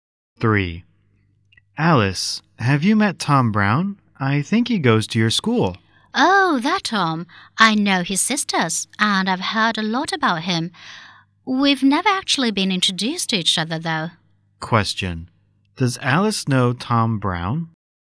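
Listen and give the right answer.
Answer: She has heard of him but they have never been introduced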